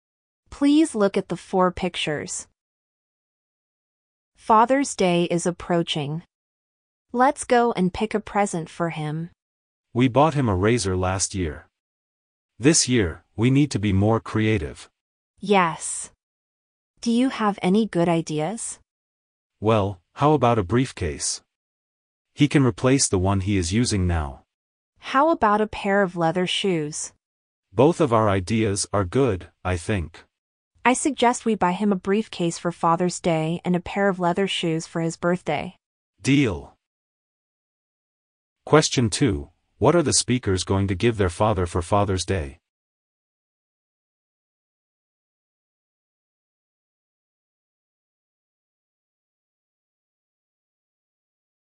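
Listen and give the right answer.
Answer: A briefcase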